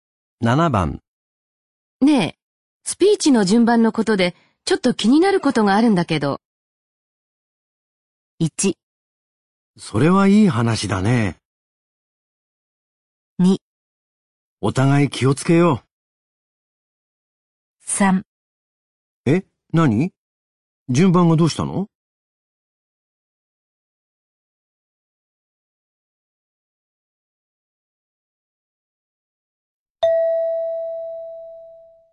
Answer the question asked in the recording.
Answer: 3

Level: N3 Listening · Test 12